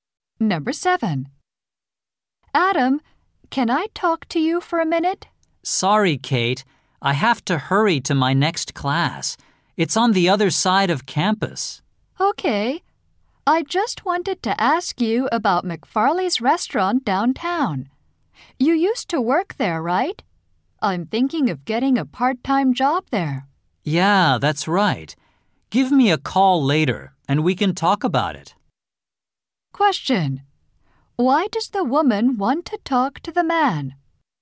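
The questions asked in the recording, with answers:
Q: Why does the woman want to talk to the man?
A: To ask about McFarley's restaurant, where she may get a part-time job.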